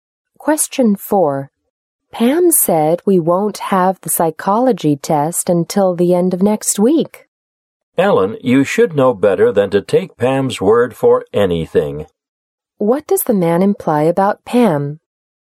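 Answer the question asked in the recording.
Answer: Pam isn't reliable; you can't trust what she says.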